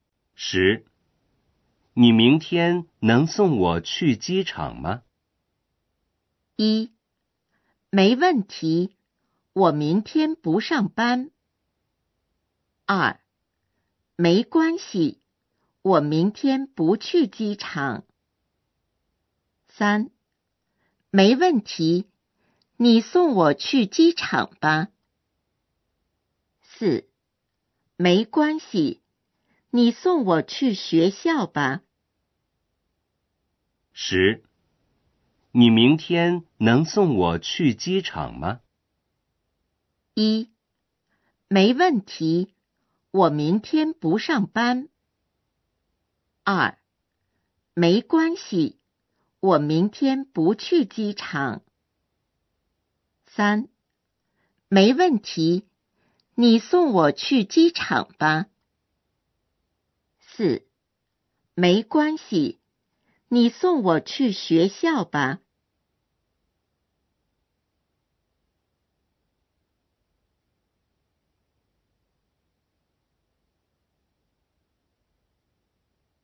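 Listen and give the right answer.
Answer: 1: 没问题,我明天不上班。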